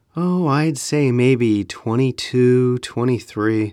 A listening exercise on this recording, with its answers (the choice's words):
英文の音声が 「答えとなる質問文」 はどちらがより適切か。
英文の音声が 「答えとなる質問文」 はどちらがより適切か。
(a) Do you know how old he is?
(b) How old do you think he is?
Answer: How old do you think he is?

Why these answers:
音声は Oh, I'd say maybe 22, 23. だから,質問文は 「何歳?」 と尋ねている方を選ぶ。